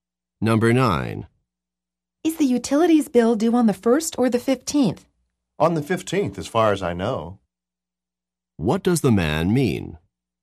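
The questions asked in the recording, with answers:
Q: What does the man mean?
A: He thinks the bill is due on the 15th, but isn't certain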